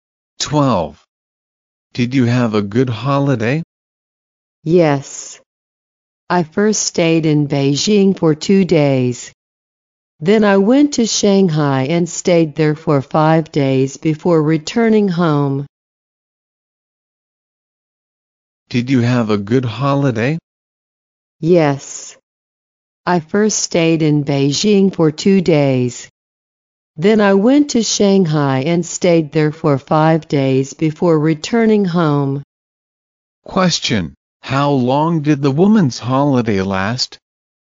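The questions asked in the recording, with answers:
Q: How long did the woman's holiday last?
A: 7 days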